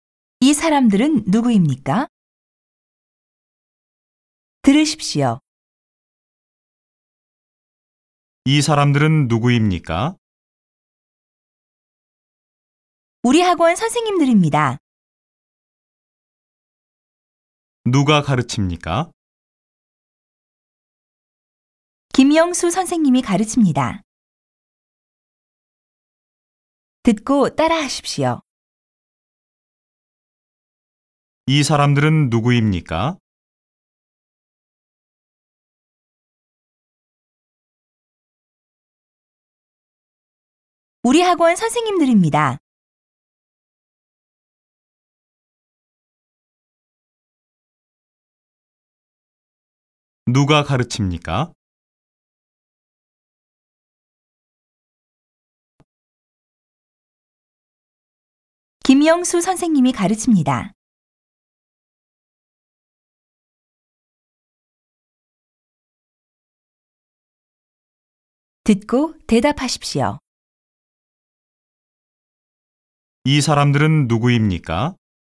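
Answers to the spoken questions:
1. 우리 학원 선생님들입니다
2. 김영수 선생님이 가르칩니다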